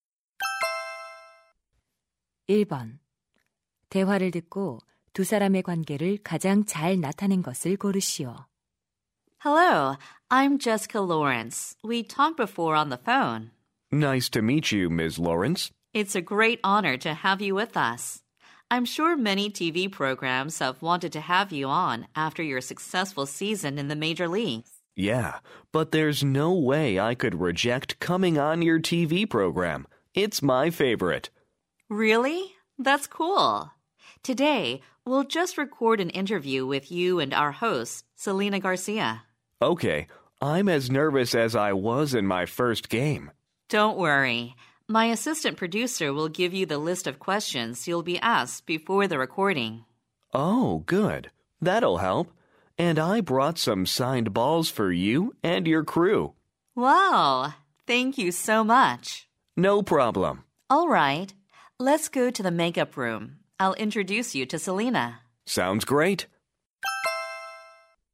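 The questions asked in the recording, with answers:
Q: 대화를 듣고 두 사람의 관계를 가장 잘 나타낸 것을 고르시오.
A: TV 프로듀서 – 야구 선수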